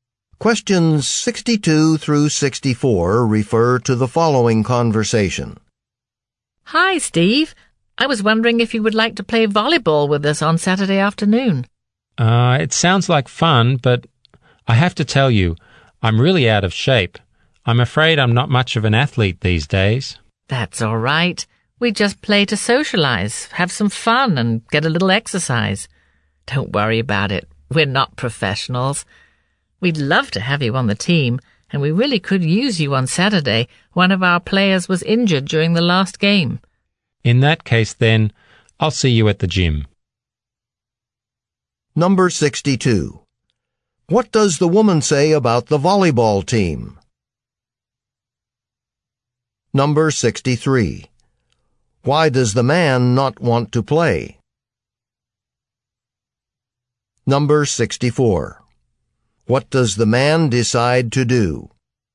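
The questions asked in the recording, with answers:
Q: What does the woman say about the volleyball team?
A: They play just to socialize and have fun; they're not professionals

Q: Why does the man not want to play?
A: He is out of shape

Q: What does the man decide to do?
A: Join the game at the gym on Saturday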